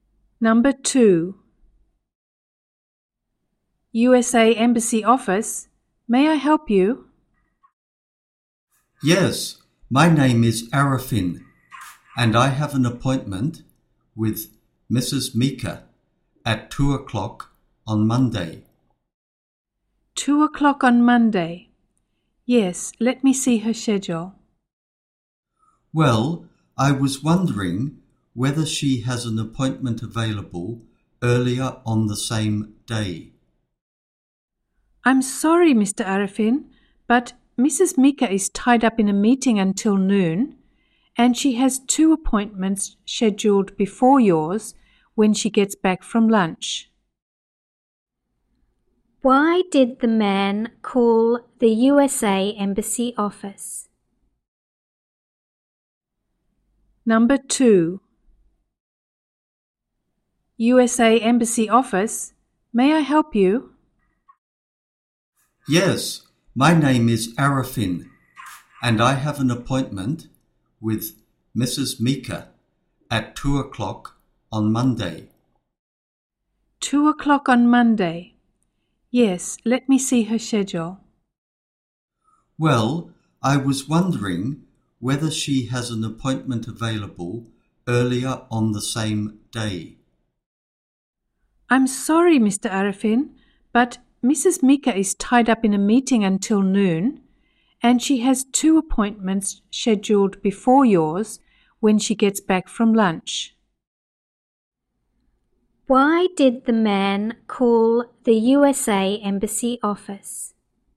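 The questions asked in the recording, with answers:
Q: Why did the man call the USA Embassy office?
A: To ask whether he could get an earlier appointment with Mrs. Mika on Monday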